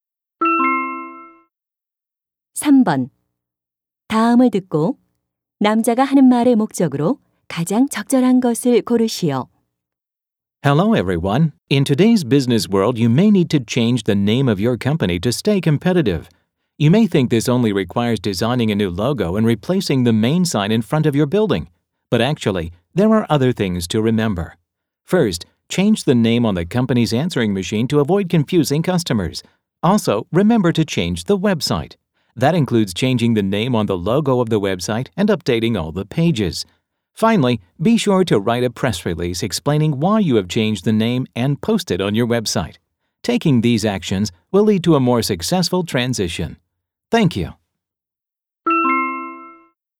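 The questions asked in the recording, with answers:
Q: 다음을 듣고 남자가 하는 말의 목적으로 가장 적절한 것을 고르시오.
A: 회사명을 변경할 때 해야 할 일들을 알려주려고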